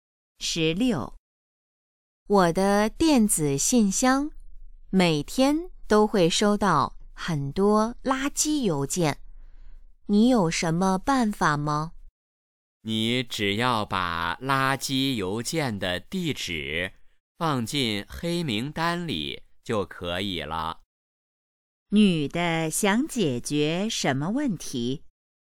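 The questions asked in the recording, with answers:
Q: 女的想解决什么问题?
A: 垃圾邮件太多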